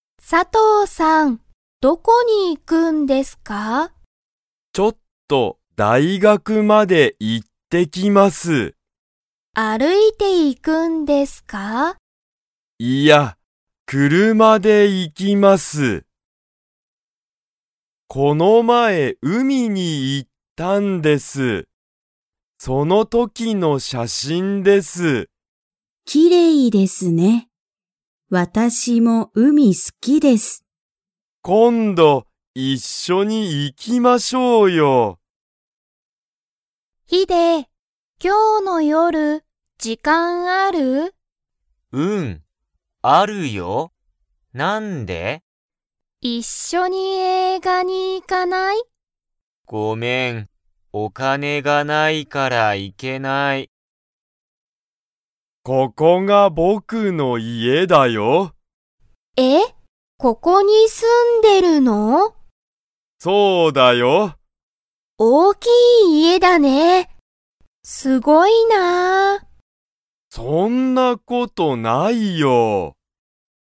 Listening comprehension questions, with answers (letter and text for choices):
Comprehension Quiz (Skip if you don't understand the conversation yet)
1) 佐藤(さとう)さんは、大学(だいがく)に歩(ある)いていきますか?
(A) はい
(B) いいえ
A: (B) いいえ

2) 高橋(たかはし)さんも____が好(す)きだ。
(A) 大学(だいがく)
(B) 車(くるま)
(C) 写真(しゃしん)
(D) 海(うみ)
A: (D) 海(うみ)

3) ヒデは、マユミと一緒(いっしょ)に映画(えいが)に行(い)きますか?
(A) はい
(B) いいえ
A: (B) いいえ

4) タカシは、____家(いえ)に住(す)んでいる。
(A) かわいい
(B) 大(おお)きい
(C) 大変(たいへん)な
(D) きれいな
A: (B) 大(おお)きい

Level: Level 1